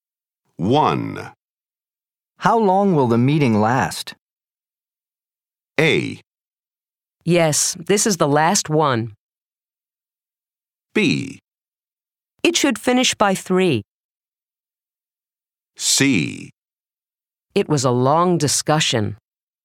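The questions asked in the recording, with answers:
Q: How long will the meeting last?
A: B: It should finish by 3.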